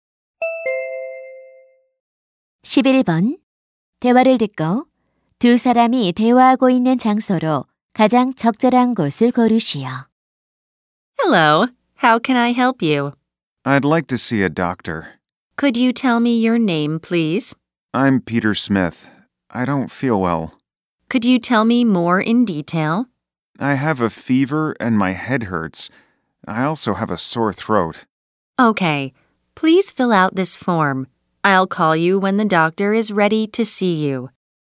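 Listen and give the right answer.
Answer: 병원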